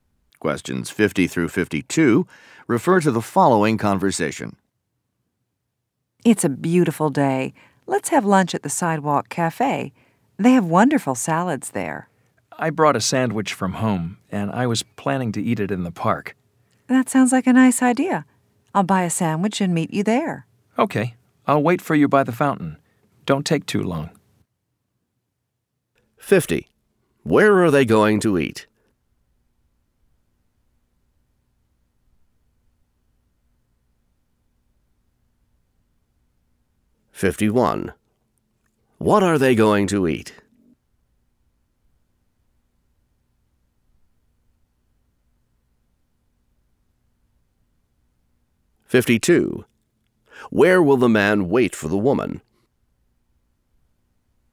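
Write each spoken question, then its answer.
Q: Where are they going to eat?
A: In the park

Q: What are they going to eat?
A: Sandwiches

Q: Where will the man wait for the woman?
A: By the fountain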